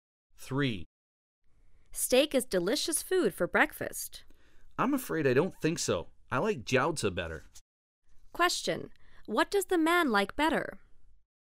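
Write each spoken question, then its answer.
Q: What does the man like better?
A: Jiaozi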